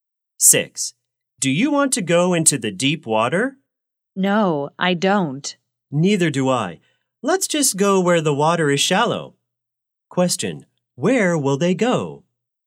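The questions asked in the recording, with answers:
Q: Question, where will they go?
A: Where the water is shallow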